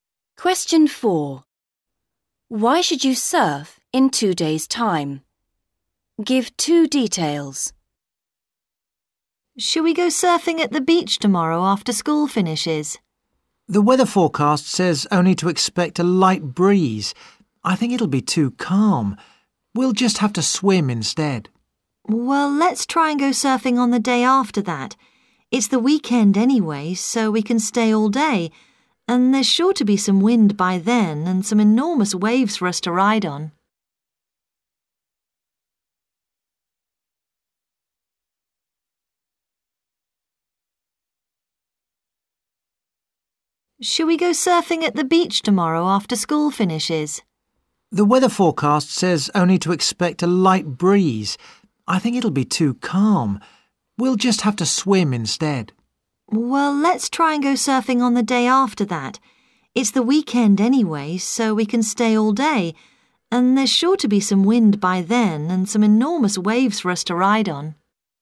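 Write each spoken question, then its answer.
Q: Why should you surf in 2 days' time?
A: There will be wind and enormous waves; it's the weekend so you can stay all day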